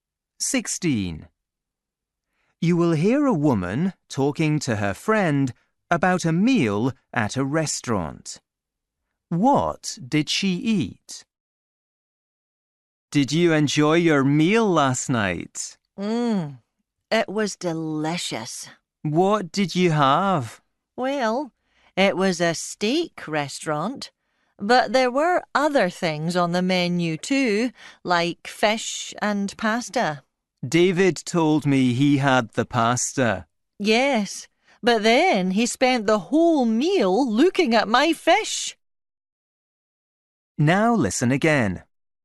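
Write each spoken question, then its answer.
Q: What did she eat?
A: fish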